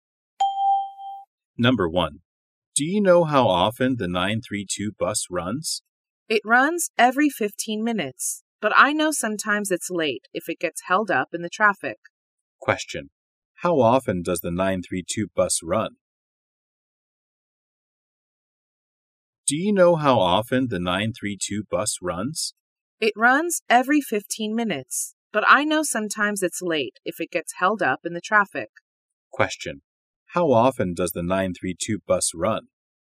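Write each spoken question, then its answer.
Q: How often does the 932 bus run?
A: Every 15 minutes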